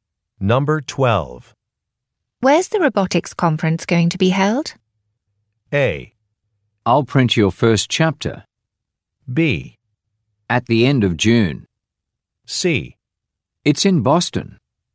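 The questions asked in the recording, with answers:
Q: Where's the robotics conference going to be held?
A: C: It's in Boston.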